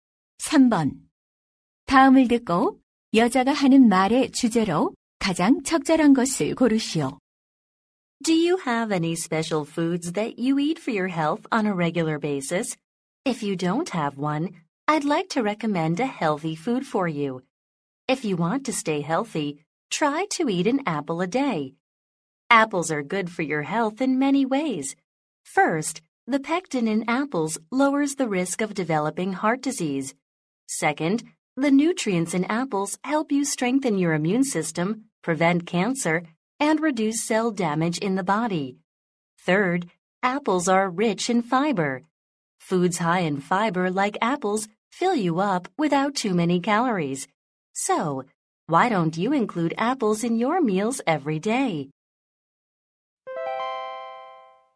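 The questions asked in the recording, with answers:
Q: 다음을 듣고 여자가 하는 말의 주제로 가장 적절한 것을 고르시오.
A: 사과를 매일 먹는 것의 건강상 이점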